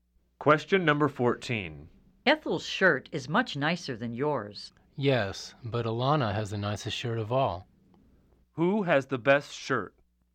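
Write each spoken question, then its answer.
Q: Who has the best shirt?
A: Alana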